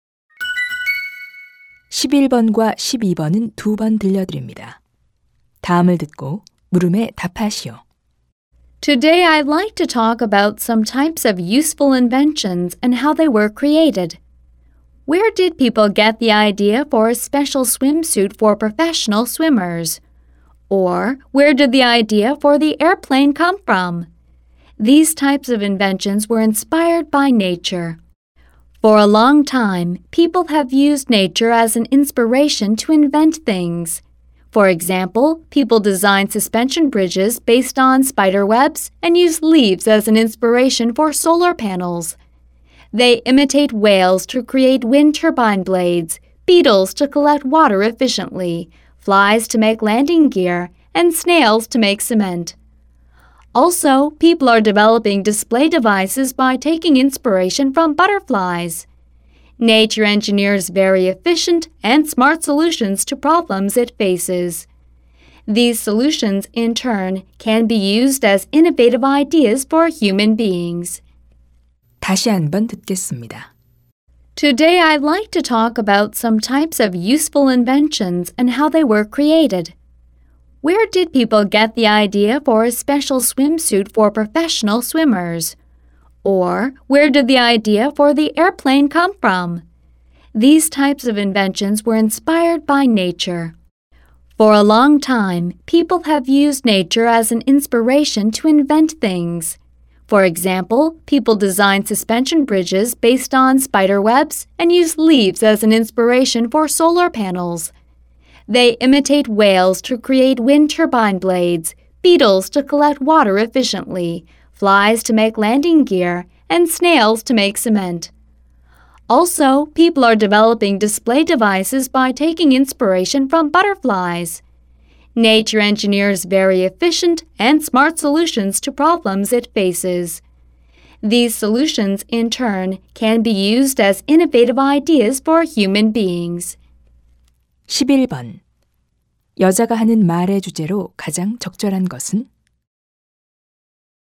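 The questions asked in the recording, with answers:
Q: 여자가 하는 말의 주제로 가장 적절한 것은?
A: 자연에서 영감을 얻은 발명품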